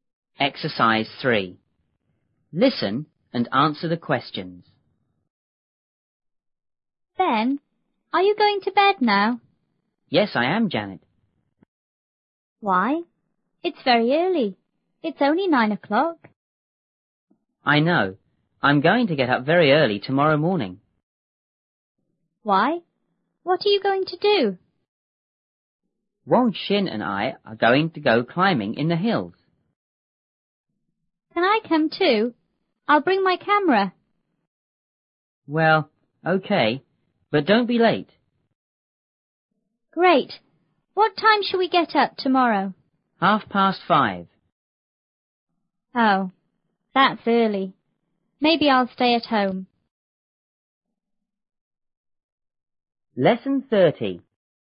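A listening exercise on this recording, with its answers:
3.Listen and answer the questions.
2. What is Ben going to do now?______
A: He is going to bed.

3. Is it early or late?______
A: It's early.

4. Is Ben going to get up early tomorrow?______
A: Yes, he is.

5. What is Ben going to do tomorrow?______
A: Go climbing in the hills.

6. Who is going with him?______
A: Wang Xin

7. Does Janet want to go,too?______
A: Yes, she does.

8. What time is Ben going to get up tomorrow?_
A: At 5:30.

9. Is Janet going to go,too?______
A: Maybe not; maybe she'll stay at home.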